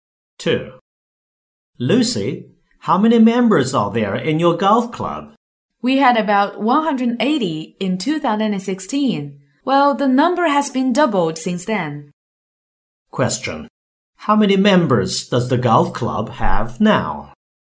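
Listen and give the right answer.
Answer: About 360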